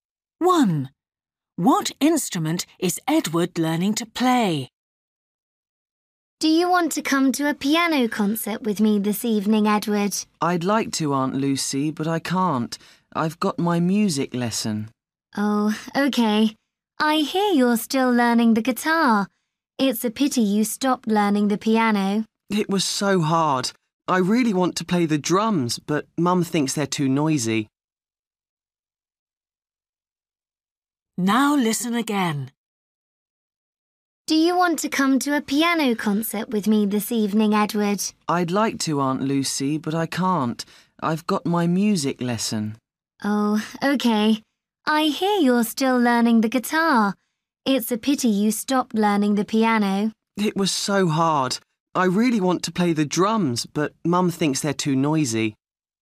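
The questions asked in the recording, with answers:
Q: What instrument is Edward learning to play?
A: the guitar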